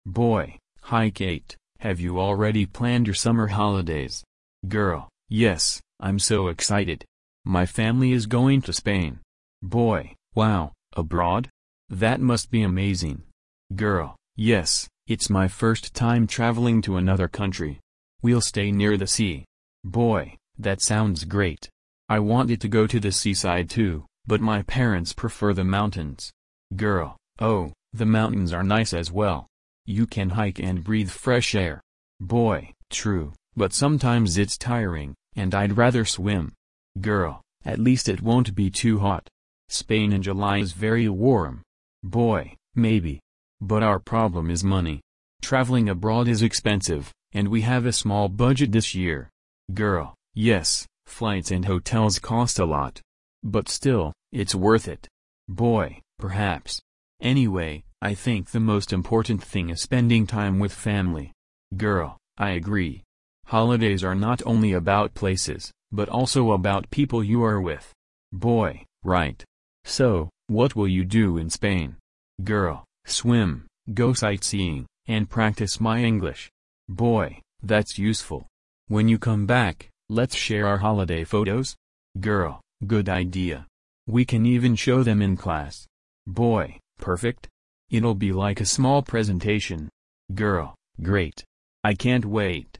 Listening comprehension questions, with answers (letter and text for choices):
You will hear a dialogue between a boy and a girl discussing their holiday plans. For questions A–E, choose the correct answer (1, 2 or 3).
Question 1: Why is the girl excited about her trip?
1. She will meet her cousins.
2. She will travel abroad for the first time.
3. She will practise her English.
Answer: 2. She will travel abroad for the first time.

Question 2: What problem does the boy mention?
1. He doesn't like long flights.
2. His family has a small budget.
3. He doesn't like the food.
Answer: 2. His family has a small budget.

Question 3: What do they agree about holidays?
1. Travelling is always fun.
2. It's important to spend time with family.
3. It's better to stay at home and relax.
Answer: 2. It's important to spend time with family.

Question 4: What do they decide to do when they come back?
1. Share photos with each other.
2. Write an article for the school newspaper.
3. Organise a presentation for their class.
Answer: 1. Share photos with each other.

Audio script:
Boy: Hi Kate, have you already planned your summer holidays?
Girl: Yes, I'm so excited! My family is going to Spain.
Boy: Wow, abroad? That must be amazing.
Girl: Yes, it's my first time travelling to another country. We'll stay near the sea.
Boy: That sounds great. I wanted to go to the seaside too, but my parents prefer the mountains.
Girl: Oh, the mountains are nice as well. You can hike and breathe fresh air.
Boy: True, but sometimes it's tiring, and I'd rather swim.
Girl: At least it won't be too hot. Spain in July is very warm.
Boy: Maybe. But our problem is money. Travelling abroad is expensive, and we have a small budget this year.
Girl: Yes, flights and hotels cost a lot. But still, it's worth it.
Boy: Perhaps. Anyway, I think the most important thing is spending time with family.
Girl: I agree. Holidays are not only about places, but also about people you are with.
Boy: Right. So, what will you do in Spain?
Girl: Swim, go sightseeing, and practise my English.
Boy: That's useful. When you come back, let's share our holiday photos.
Girl: Good idea! We can even show them in class.
Boy: Perfect. It'll be like a small presentation.
Girl: Great! I can't wait.